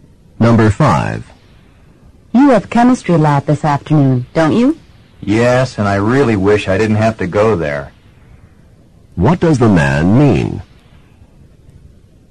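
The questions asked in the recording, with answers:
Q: What does the man mean?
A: He has to go to the lab, but he doesn't want to.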